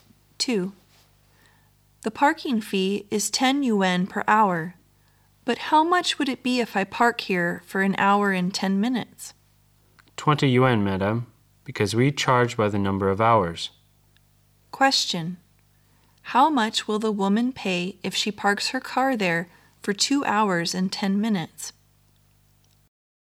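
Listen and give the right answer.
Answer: 30 yuan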